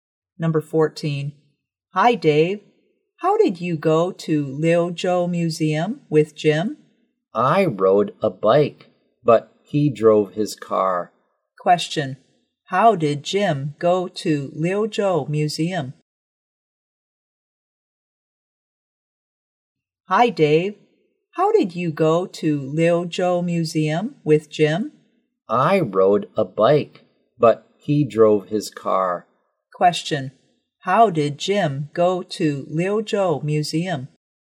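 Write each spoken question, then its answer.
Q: how did Jim go to Liuzhou Museum?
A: By car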